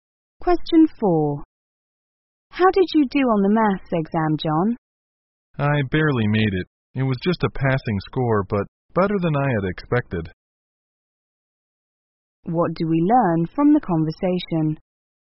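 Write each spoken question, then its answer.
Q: What do we learn from the conversation?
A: John just barely passed the maths exam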